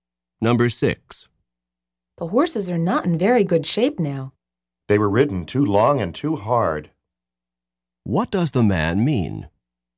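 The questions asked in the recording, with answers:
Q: What does the man mean?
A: Someone rode the horses too long and too hard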